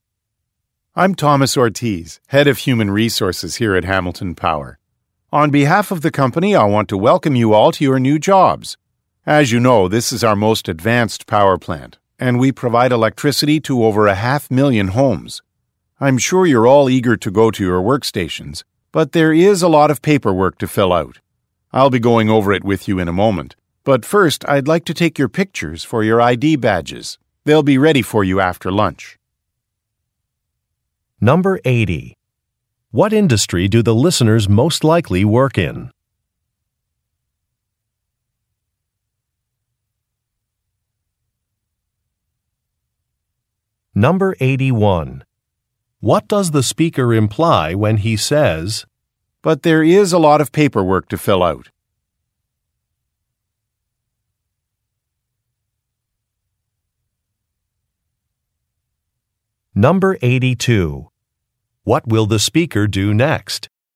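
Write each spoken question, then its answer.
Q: What industry do the listeners most likely work in?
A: Energy (electric power)

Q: What does the speaker imply when he says, "But there is a lot of paperwork to fill out"?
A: The listeners will not go to their workstations right away

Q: What will the speaker do next?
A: Take photos for ID badges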